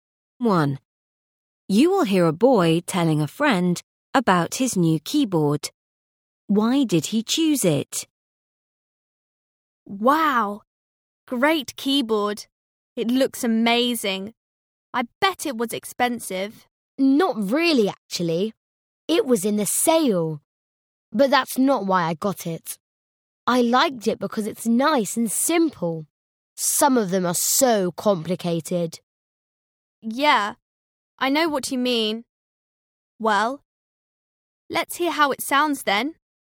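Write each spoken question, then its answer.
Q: Why did he choose it?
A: Because it's nice and simple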